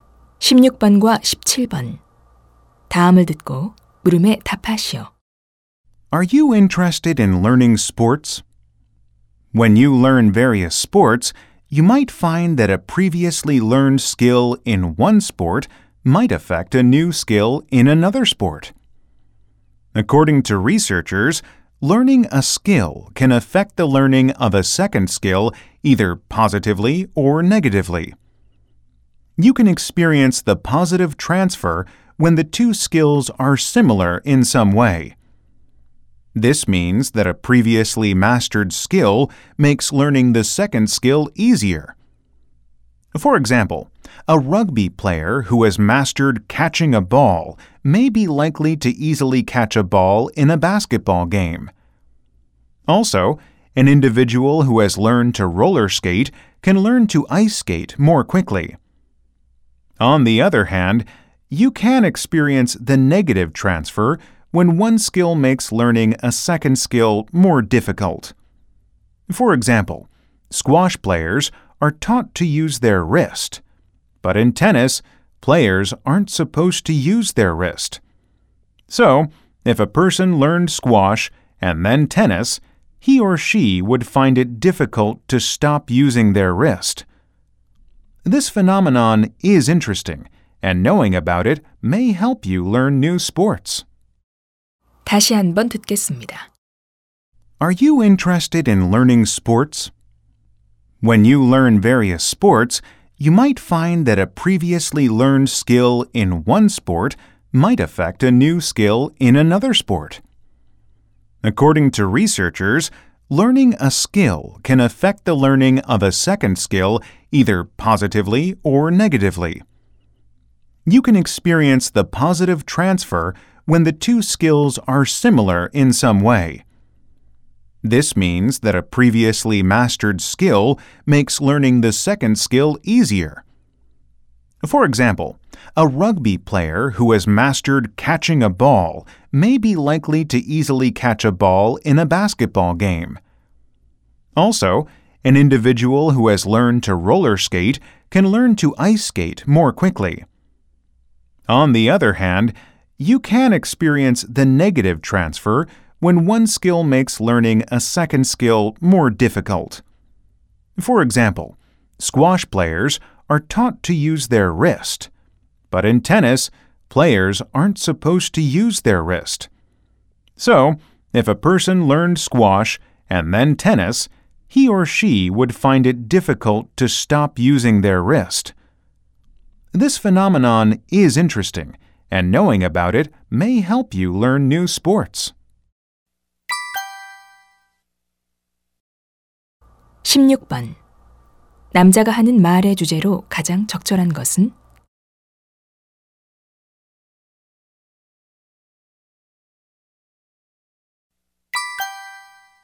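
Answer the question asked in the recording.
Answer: 먼저 배운 운동 기술이 새 운동 기술 학습에 미치는 영향(긍정적·부정적 전이)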